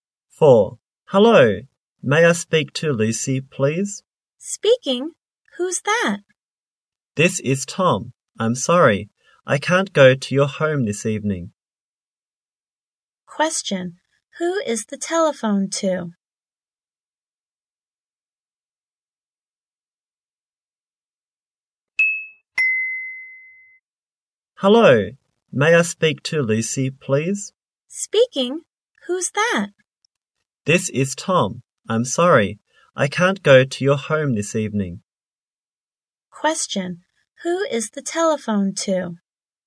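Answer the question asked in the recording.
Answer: Lucy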